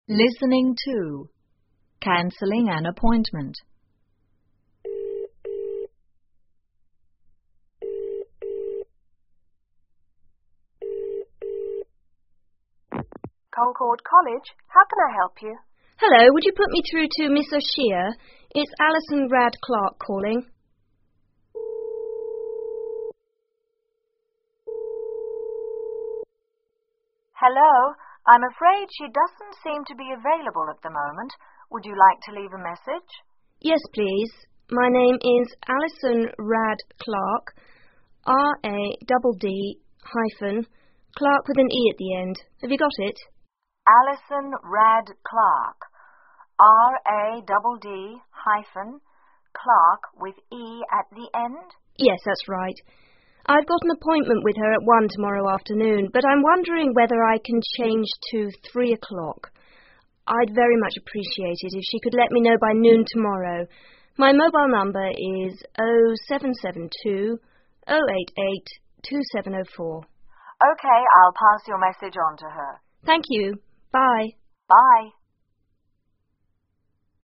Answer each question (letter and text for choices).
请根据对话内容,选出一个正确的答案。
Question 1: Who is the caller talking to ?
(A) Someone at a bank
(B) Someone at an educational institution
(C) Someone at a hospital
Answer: (B) Someone at an educational institution

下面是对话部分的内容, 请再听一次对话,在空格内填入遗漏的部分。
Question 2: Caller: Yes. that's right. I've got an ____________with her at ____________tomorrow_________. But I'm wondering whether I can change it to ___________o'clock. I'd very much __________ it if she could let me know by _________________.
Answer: appointment one afternoon 3 appreciate noon tomorrow

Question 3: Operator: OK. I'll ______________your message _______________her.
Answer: pass on to